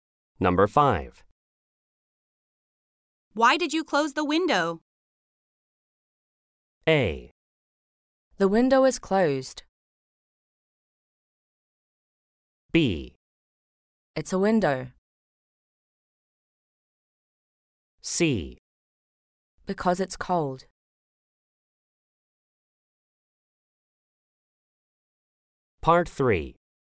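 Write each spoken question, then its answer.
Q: Why did you close the window?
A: C: Because it's cold.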